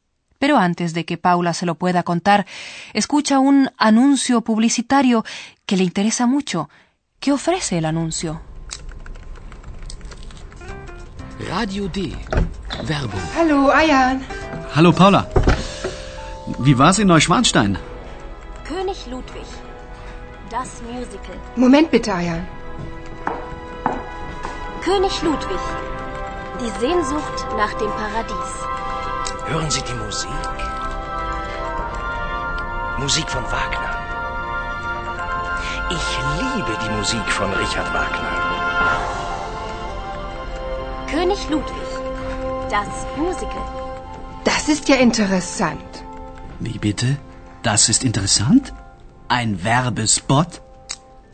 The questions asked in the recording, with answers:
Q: ¿Qué ofrece el anuncio?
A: El comercial hace publicidad a un musical sobre la vida y muerte del rey Luis II.